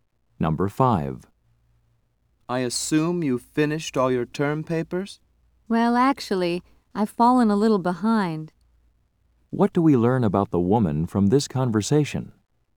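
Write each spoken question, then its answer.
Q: What do we learn about the woman from this conversation?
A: She hasn't finished her term papers.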